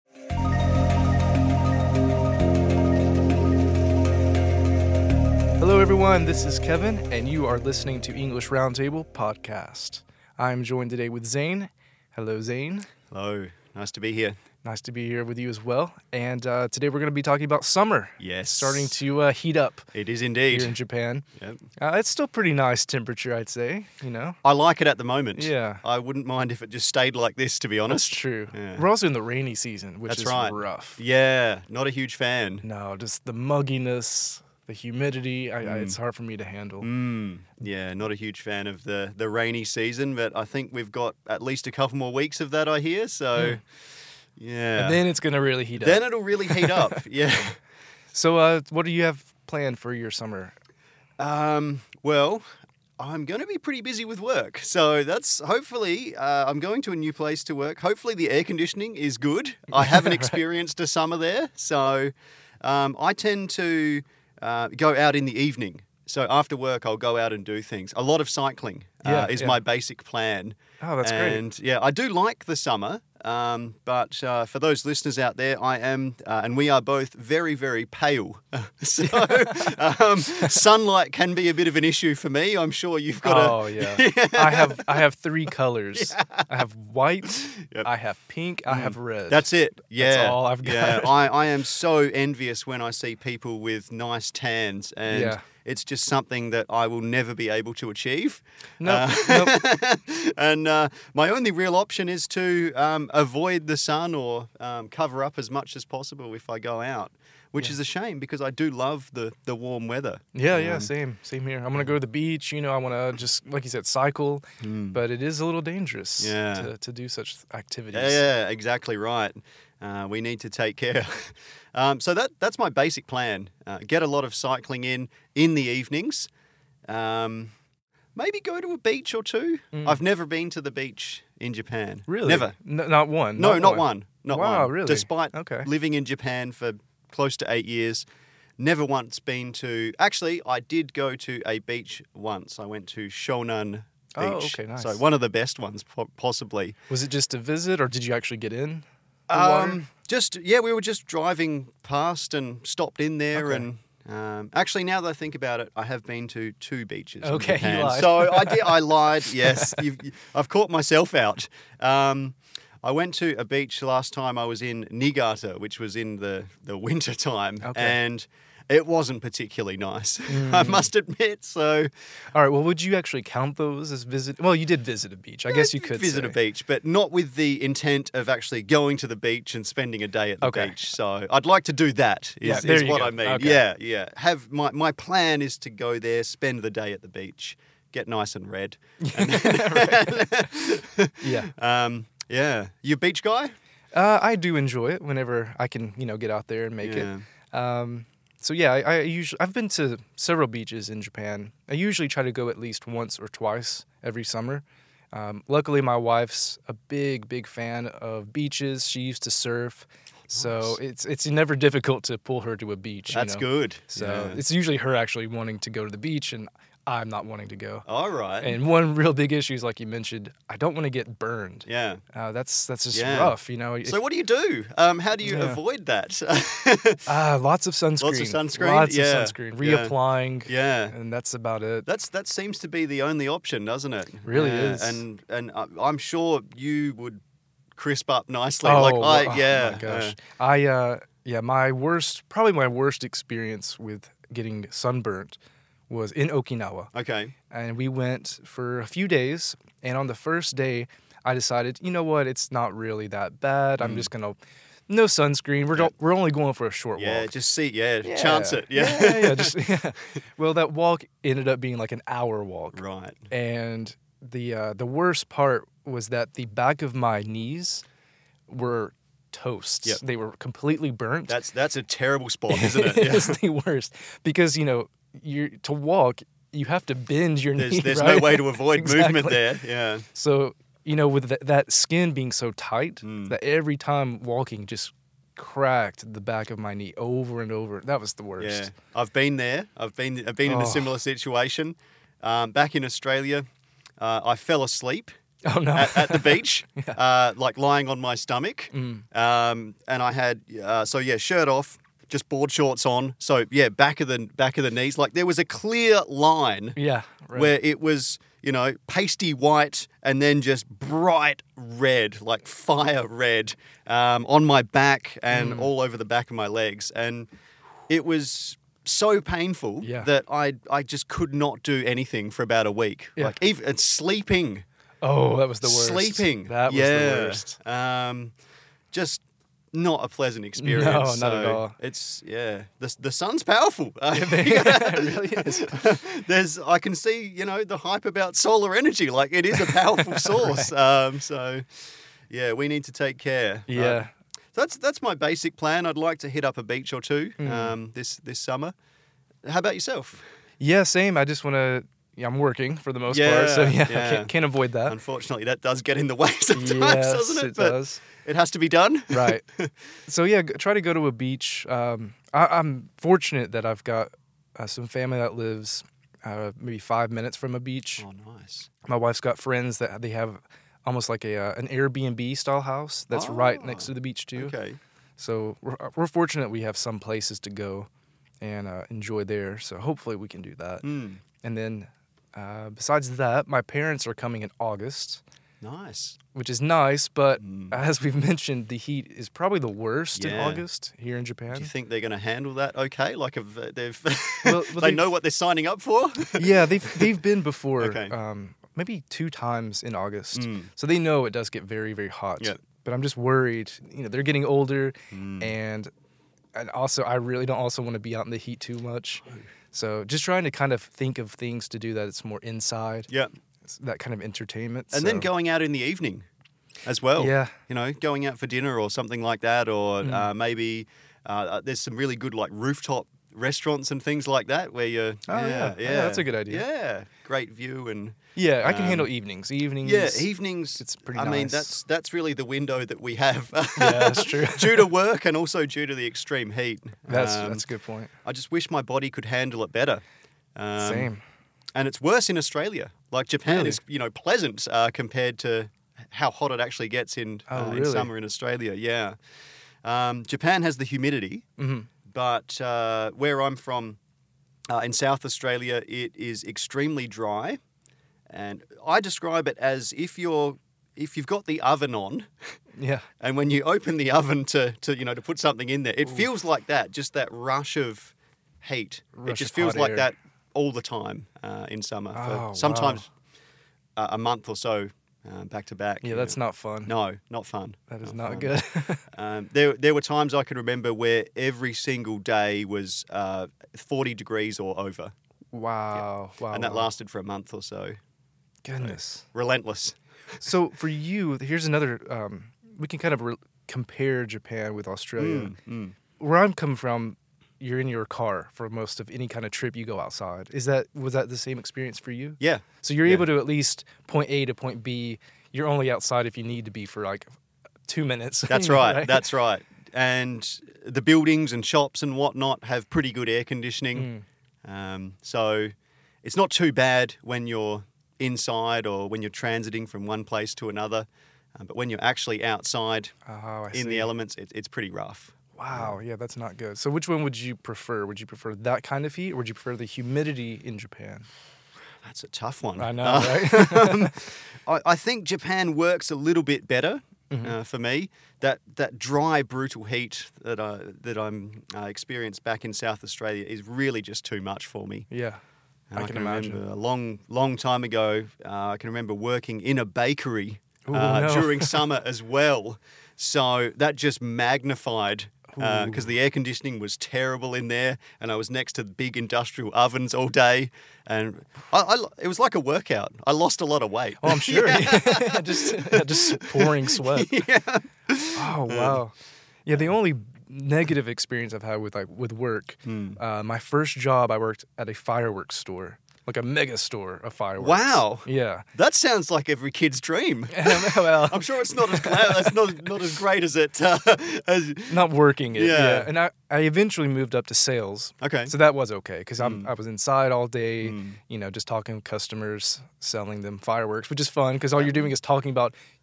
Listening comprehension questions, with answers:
What will Zane mostly do during the summer?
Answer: Work